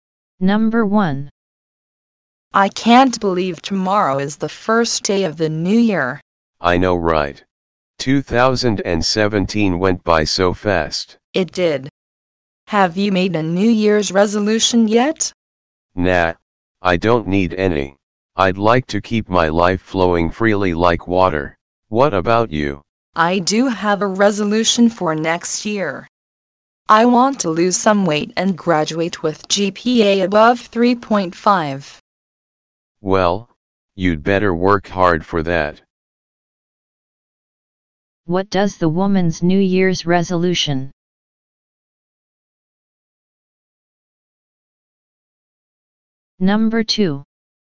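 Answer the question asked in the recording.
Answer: To lose some weight and graduate with a GPA above 3.5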